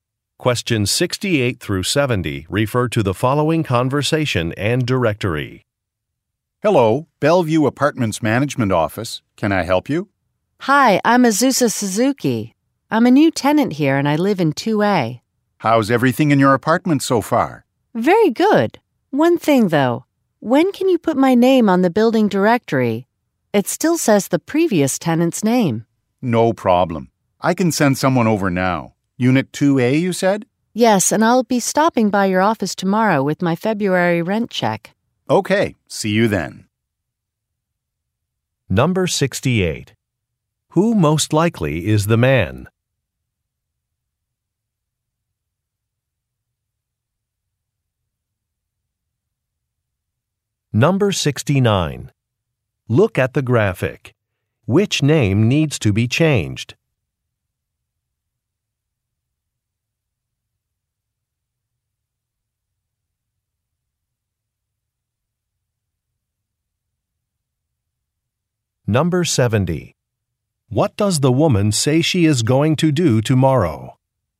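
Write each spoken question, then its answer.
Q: Who most likely is the man?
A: A building manager

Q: What does the woman say she is going to do tomorrow?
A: Drop off her rent check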